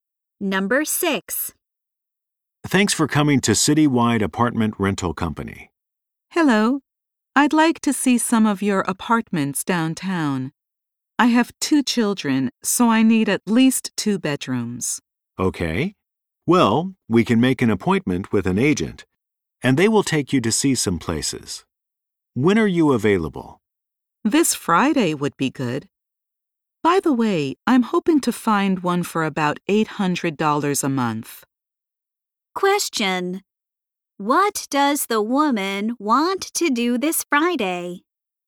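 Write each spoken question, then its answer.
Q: What does the woman want to do this Friday?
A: See some apartments with an agent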